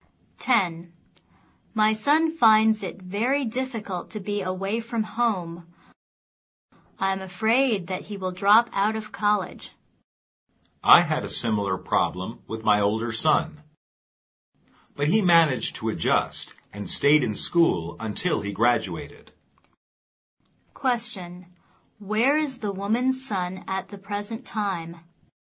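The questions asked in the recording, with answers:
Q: Where is the woman's son at the present time?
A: At college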